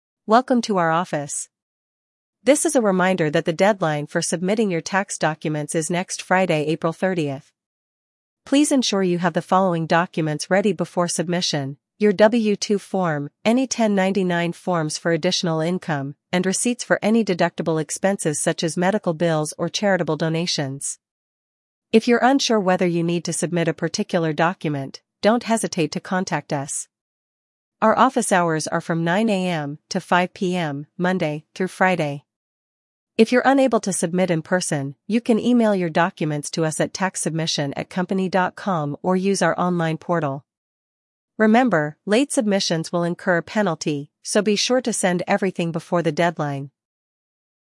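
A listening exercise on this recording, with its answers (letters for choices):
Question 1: When is the deadline for submitting tax documents?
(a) April 15th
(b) April 30th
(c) May 15th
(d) May 30th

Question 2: Which document is NOT required for tax submission?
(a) W-2 form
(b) 1099 form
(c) Taxpayer's birth certificate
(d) Receipts for deductible expenses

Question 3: What should you do if you're unsure about the required documents?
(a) Submit everything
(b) Contact the office for clarification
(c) Wait until the last day to submit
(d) Ignore the requirements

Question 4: What is the contact method for submitting documents if you cannot submit in person?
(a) Fax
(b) Email or online portal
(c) Mail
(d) In-person drop-off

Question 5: What is the penalty for late submission?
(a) No penalty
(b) A small fee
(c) A large fine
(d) Late submission will incur a penalty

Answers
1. b
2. c
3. b
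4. b
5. d

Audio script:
Welcome to our office. This is a reminder that the deadline for submitting your tax documents is next Friday, April 30th. Please ensure you have the following documents ready before submission: your W-2 form, any 1099 forms for additional income, and receipts for any deductible expenses such as medical bills or charitable donations. If you're unsure whether you need to submit a particular document, don't hesitate to contact us. Our office hours are from 9 AM to 5 PM, Monday through Friday. If you're unable to submit in person, you can email your documents to us at taxsubmission@company.com or use our online portal. Remember, late submissions will incur a penalty, so be sure to send everything before the deadline.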